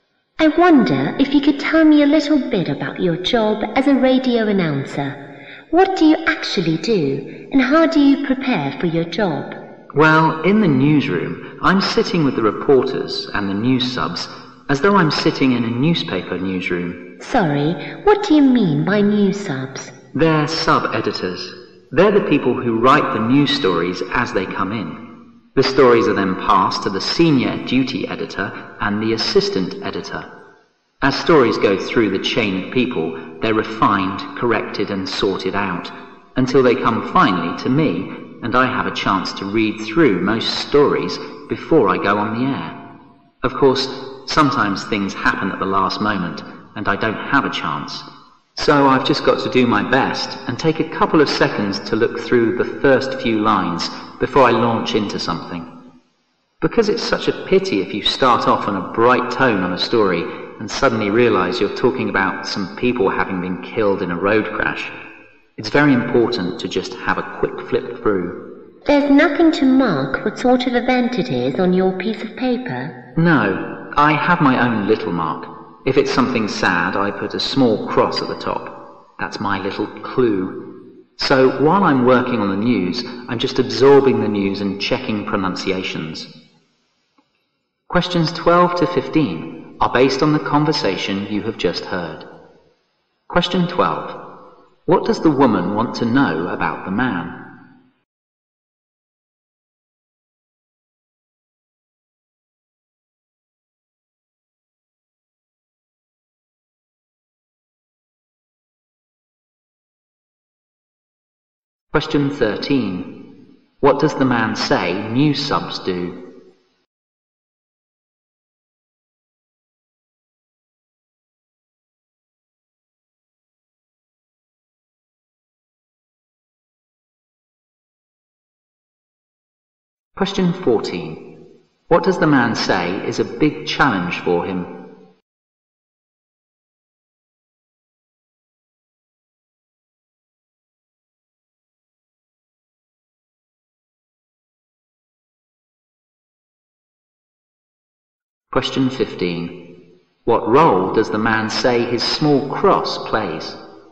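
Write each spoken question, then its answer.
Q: What does the woman want to know about the man?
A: His job as a radio announcer and how he prepares for it

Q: What does the man say news subs do?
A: They write the news stories as they come in

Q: What role does the man say his small cross plays?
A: It tells him the story is sad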